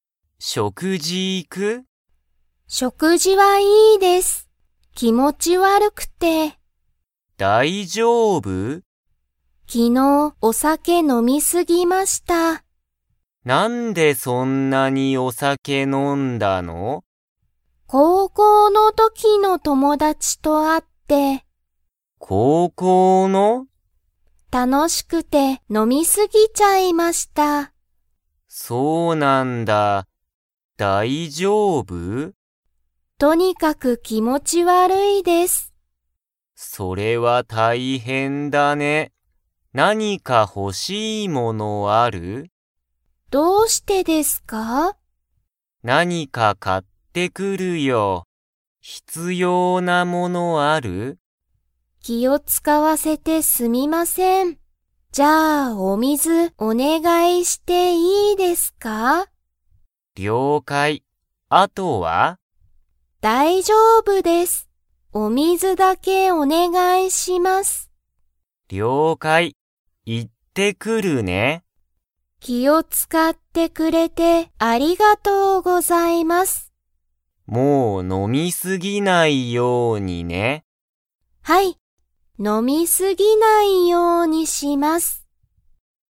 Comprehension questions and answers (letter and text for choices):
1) マミは、昨日きのう の時ときの友達ともだちと会あった。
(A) 小学校しょうがっこう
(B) 中学校ちゅうがっこう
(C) 高校こうこう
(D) 大学だいがく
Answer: (C) 高校こうこう

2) マミは、お水みずのほかに必要ひつようなものはありますか?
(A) ある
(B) ない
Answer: (B) ない

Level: Level 3